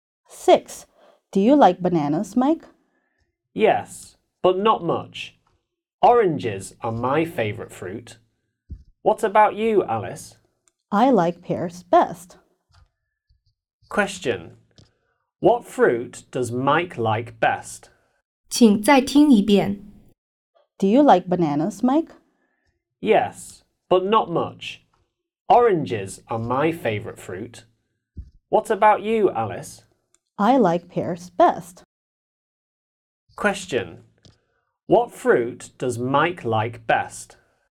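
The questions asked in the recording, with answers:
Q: What fruit does Mike like best?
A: Oranges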